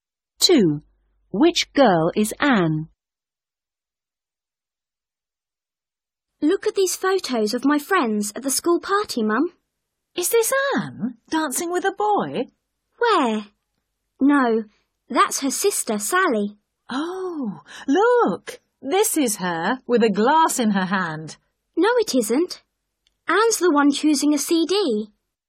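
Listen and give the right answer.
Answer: The one choosing a CD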